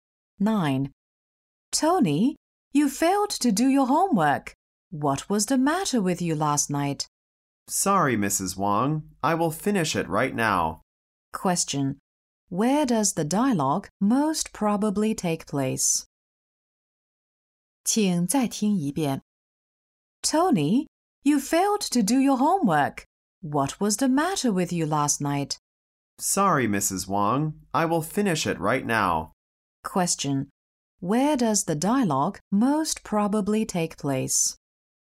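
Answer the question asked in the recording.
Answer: At school (in the classroom)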